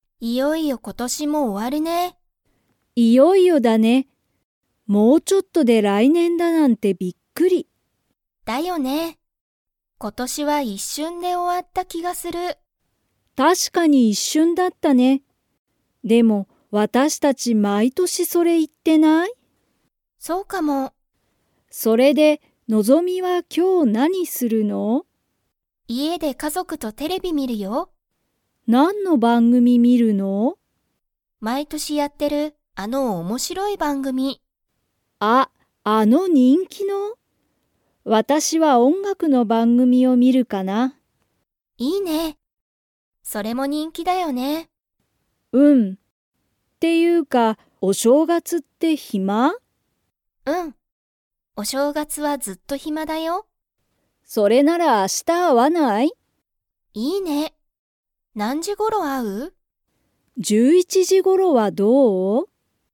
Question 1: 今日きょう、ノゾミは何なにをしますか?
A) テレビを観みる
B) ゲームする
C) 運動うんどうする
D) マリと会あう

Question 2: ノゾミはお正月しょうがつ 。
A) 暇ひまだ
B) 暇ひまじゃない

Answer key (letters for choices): 1A, 2A

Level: Level 4